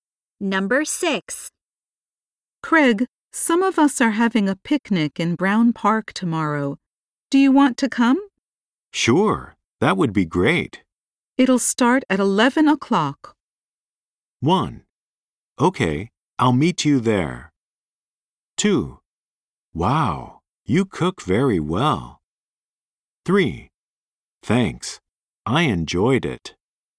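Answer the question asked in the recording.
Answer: 1: Okay, I'll meet you there.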